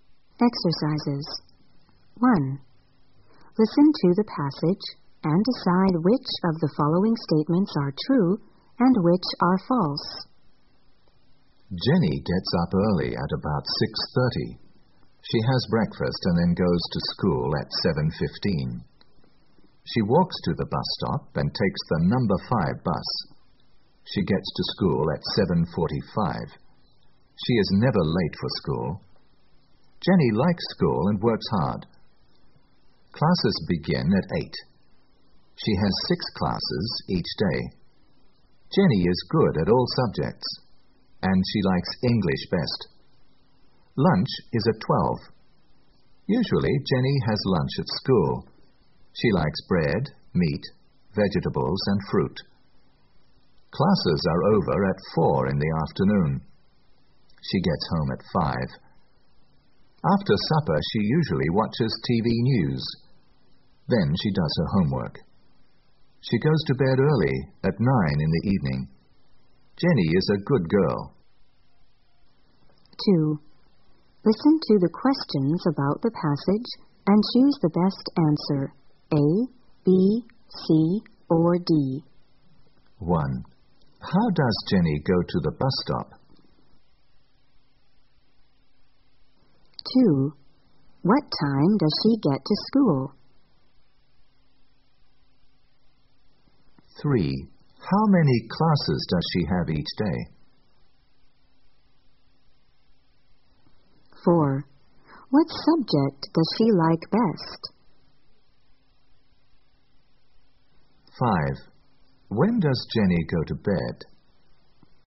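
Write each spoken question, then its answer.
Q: How does Jenny go to the bus stop?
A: She walks

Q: What time does she get to school?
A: At 7:45

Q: What subject does she like best?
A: English

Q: When does Jenny go to bed?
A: At 9 in the evening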